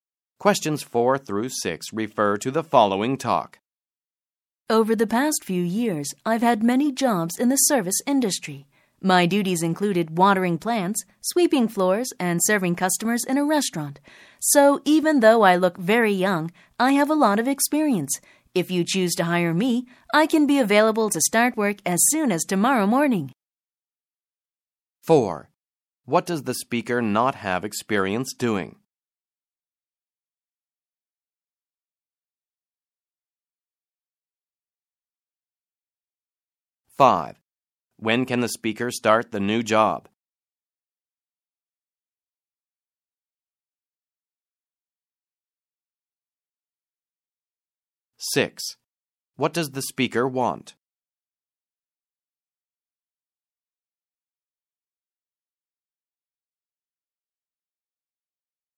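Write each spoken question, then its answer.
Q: When can the speaker start the new job?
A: As soon as tomorrow morning

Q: What does the speaker want?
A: To be hired for a job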